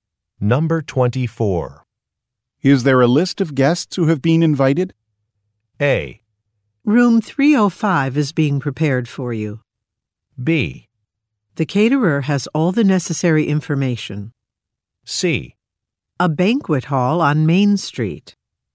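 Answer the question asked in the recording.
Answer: B: The caterer has all the necessary information.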